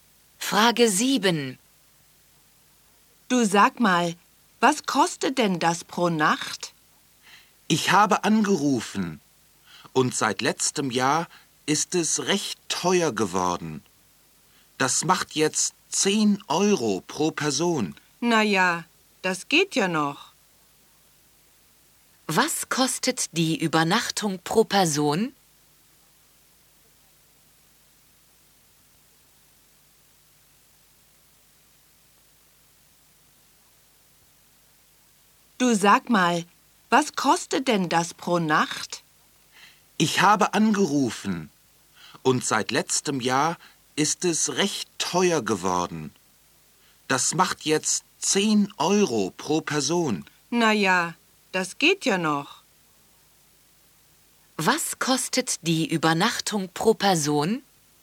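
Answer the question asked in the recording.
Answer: 10 €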